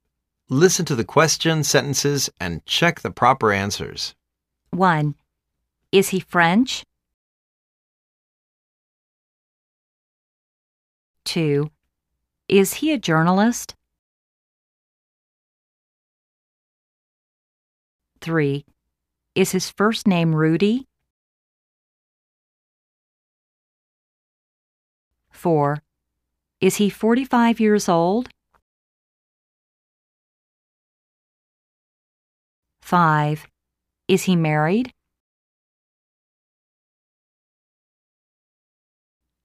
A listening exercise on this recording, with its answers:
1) Is he French?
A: Yes. His hometown is in France.

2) Is he a journalist?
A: No. He's a teacher.

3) Is his first name Rudi?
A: Yes. He is Rudi White.

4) Is he 45 years old?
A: No. He is just 40 last year.

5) Is he married?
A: Yes. But, now he's divorce.